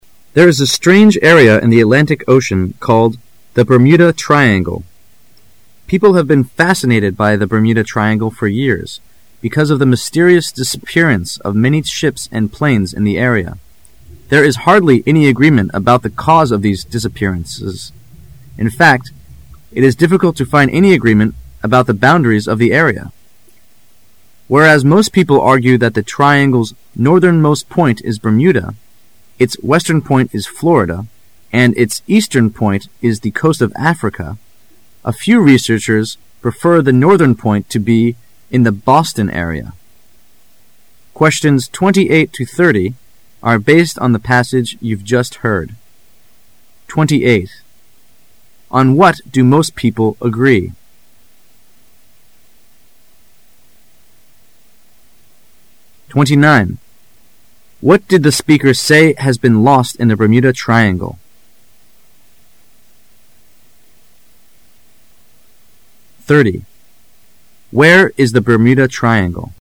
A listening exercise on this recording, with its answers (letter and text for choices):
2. What did the speaker say have been lost in the Bermuda Triangle?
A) Money.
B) Ships and planes.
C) Florida.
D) Trains and .cars.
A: B) Ships and planes.

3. Where is the Bermuda Triangle?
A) In the Pacific ocean.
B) Close to Europe.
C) Nobody knows.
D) In the Atlantic Ocean.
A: D) In the Atlantic Ocean.

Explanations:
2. What did the speaker say have been lost in the Bermuda Triangle? [试题分析]本题是一道细节题。 [关键词语]disappearance 0f many ships and planes [详细解答]这道题主要是考查考生听音是否细心,只要注意到细节,是不难得出答案的。
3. Where is the Bermuda Triangle? [试题分析]本题是一道细节题兼推断题。 [关键词语]the Atlantic Ocean [详细解答]这道题的答案在一开始就已出现,经过训练,对文中开头一句特别注意的考生是不难得出答案的。即便漏听了第一句,考生也可以根据后面提到的地理位置推断出答案。

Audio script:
[解析] 28-30 There is a strange area in the Atlantic Ocean called the Bermuda Triangle. People have been fascinated by the Bermuda Triangle for years, because of the mysterious disappearance of many ships and planes in the area. There is hardly any agreement about the cause of this disappearance; in fact, it is difficult to find any agreement about the boundaries of the area. Whereas most people argue that the triangle' s northern most point is Bermuda, its western most point is Florida, and its eastern point is the coast of Africa, a few researchers prefer the northern point to be in the Boston area. On what do most people agree?